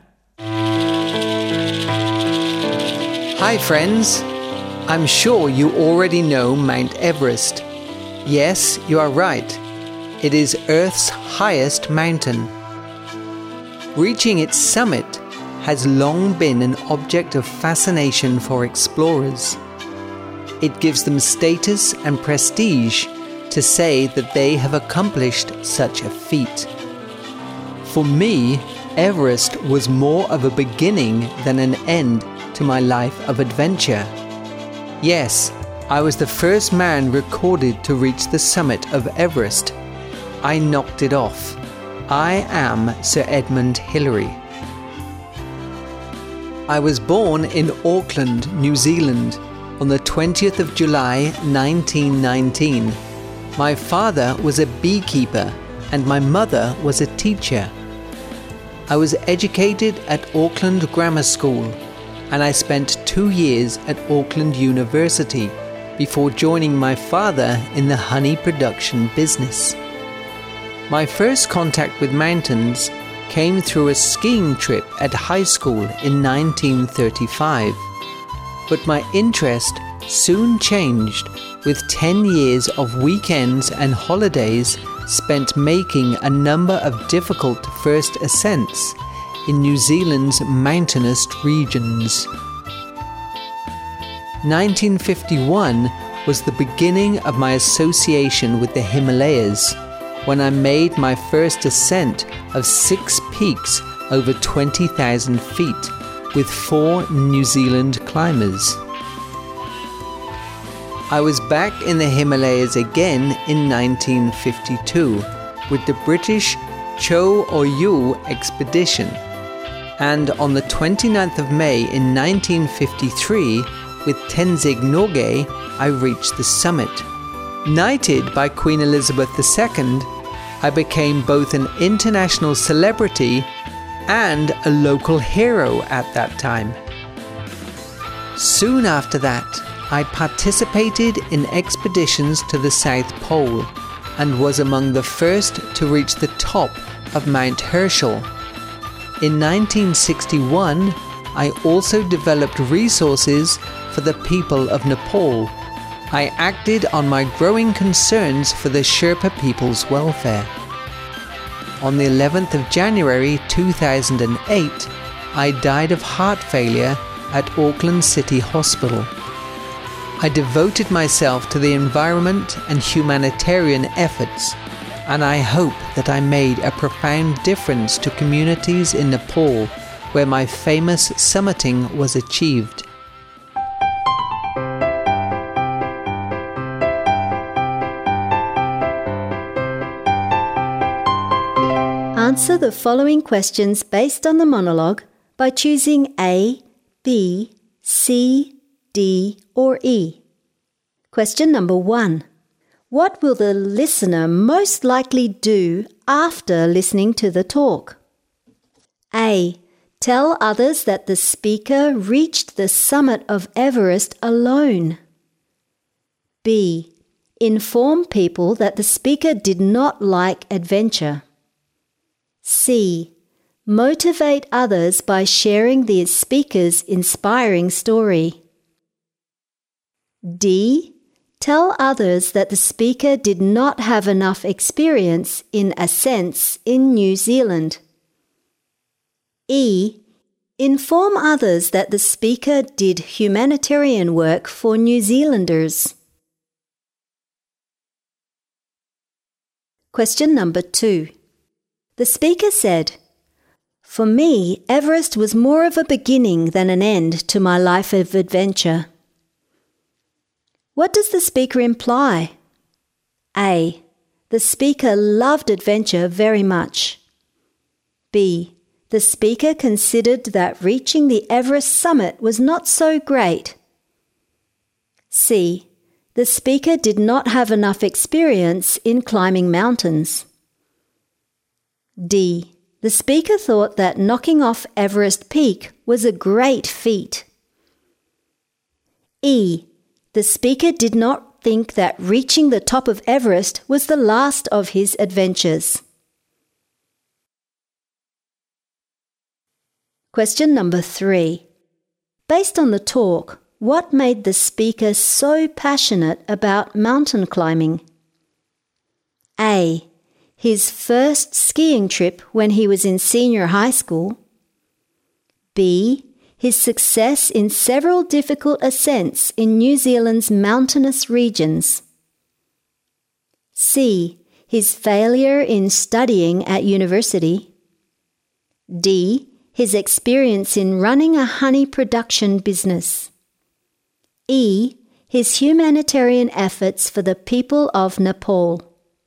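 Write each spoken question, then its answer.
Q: What will the listener most likely do after listening to the talk?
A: C: Motivate others by sharing the speaker's inspiring story.

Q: The speaker said, "For me, Everest was more of a beginning than an end to my life of adventure." What does the speaker imply?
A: E: The speaker did not think that reaching the top of Everest was the last of his adventures.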